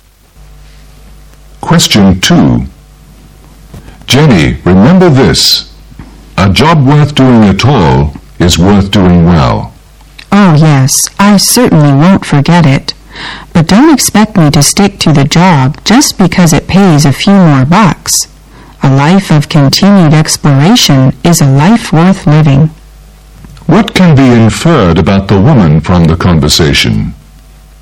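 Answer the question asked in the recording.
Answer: She cares more about exploring life than about higher pay.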